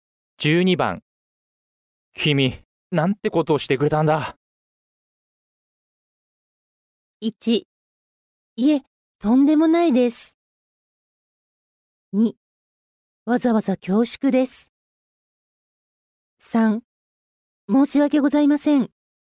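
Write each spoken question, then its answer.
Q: 君、なんてことをしてくれたんだ。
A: 3: 申し訳ございません。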